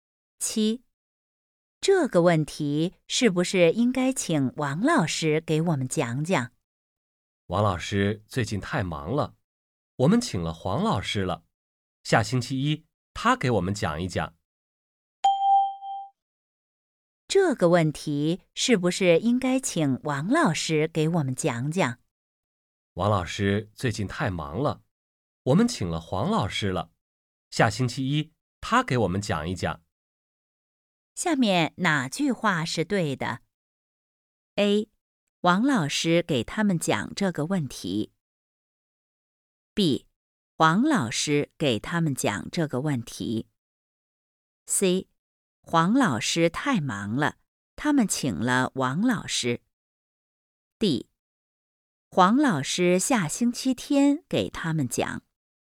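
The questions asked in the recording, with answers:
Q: 下面哪句话是对的?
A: B: 黄老师给他们讲这个问题。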